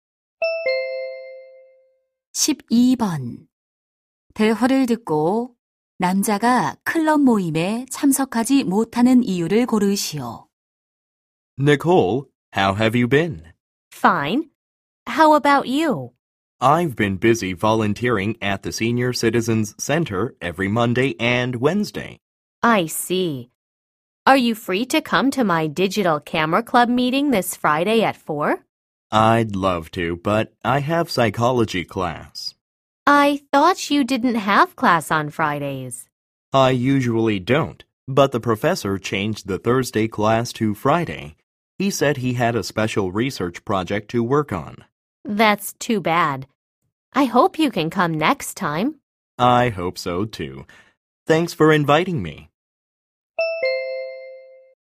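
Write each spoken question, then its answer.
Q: 대화를 듣고 남자가 클럽 모임에 참석하지 못하는 이유를 고르시오.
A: 심리학 수업이 금요일로 바뀌어서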